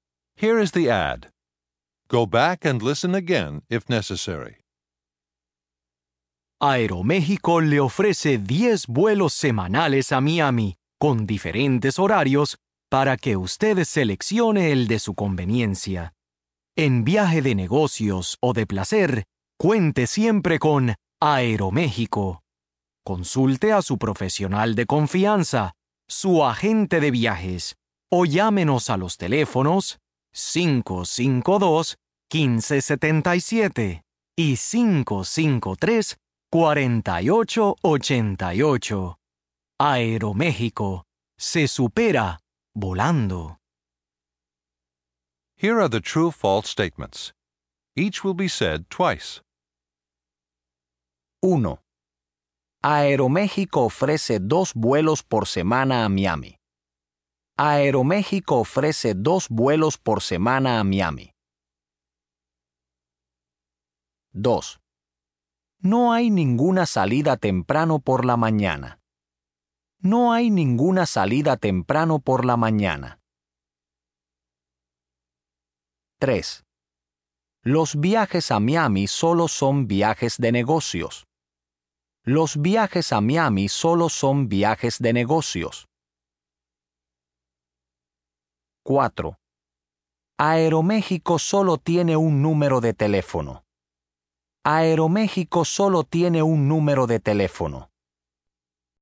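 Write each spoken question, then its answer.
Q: Aeroméxico ofrece 2 vuelos por semana a Miami.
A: F (falso): ofrece 10 vuelos semanales

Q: Los viajes a Miami solo son viajes de negocios.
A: F (falso): de negocios o de placer

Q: Aeroméxico solo tiene un número de teléfono.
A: F (falso): tiene dos números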